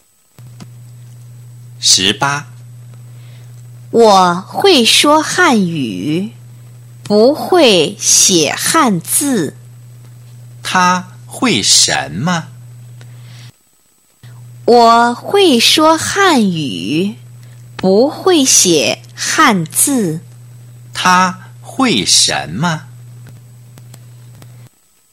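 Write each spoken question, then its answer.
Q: 他会什么?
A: 说汉语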